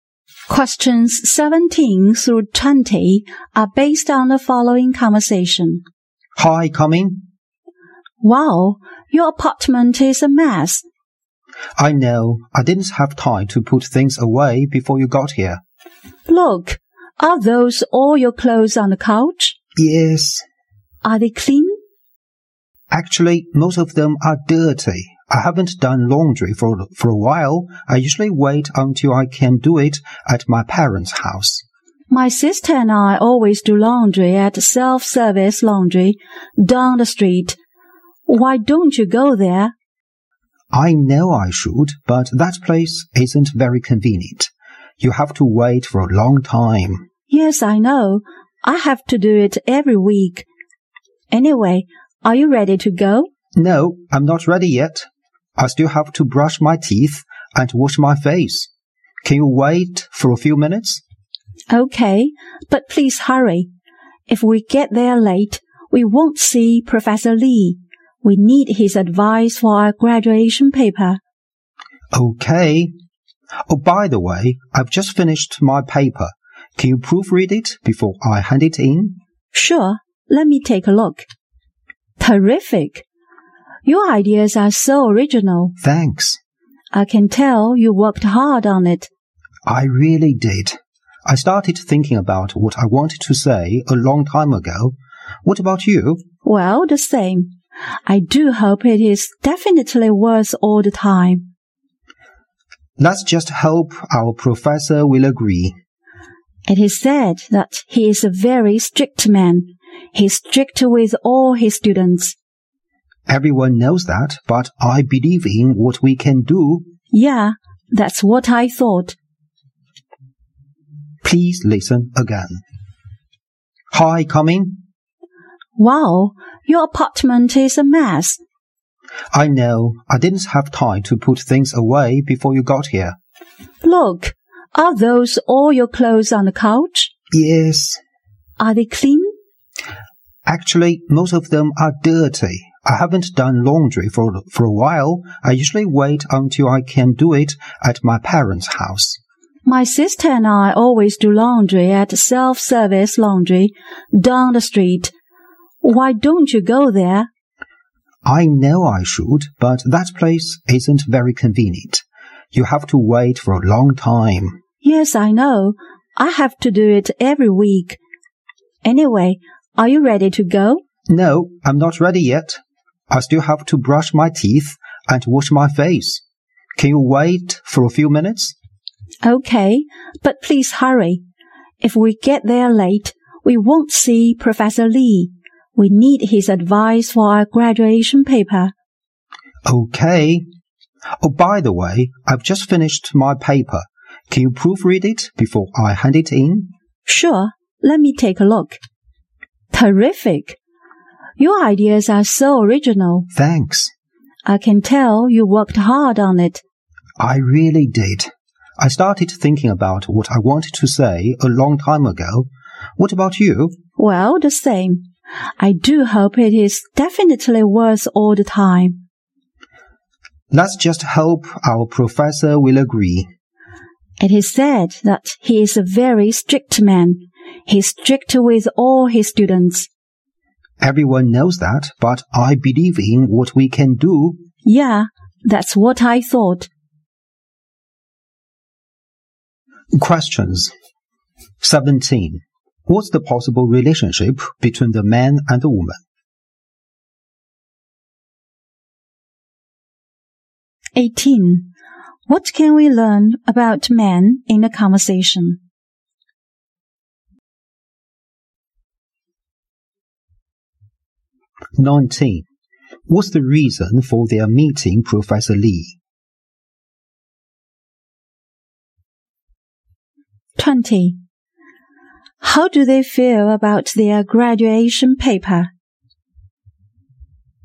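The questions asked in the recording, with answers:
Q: What's the possible relationship between the man and the woman?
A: Classmates.

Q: What's the reason for their meeting Professor Lee?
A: To get his advice on their graduation paper.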